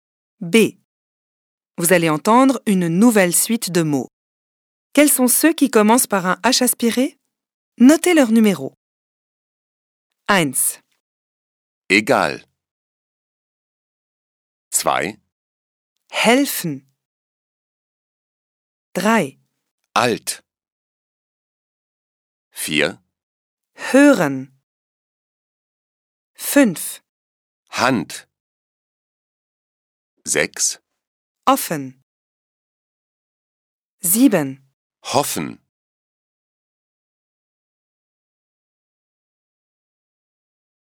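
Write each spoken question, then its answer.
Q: Quels sont ceux qui commencent par un H aspiré?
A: 2, 4, 5, 7 (Helfen, Hören, Hand, Hoffen)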